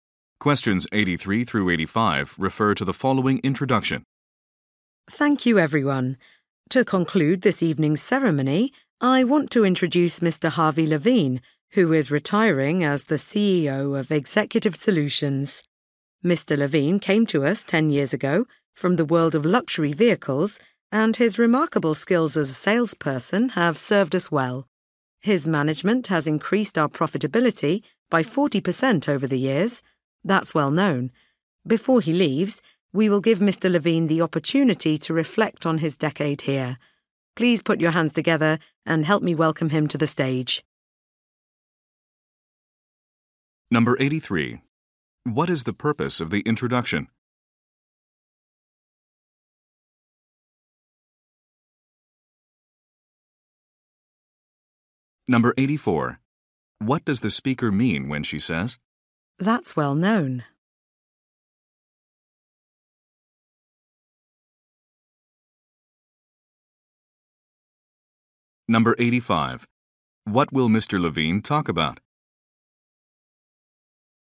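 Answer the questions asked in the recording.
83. To introduce a retiring CEO
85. His decade at the company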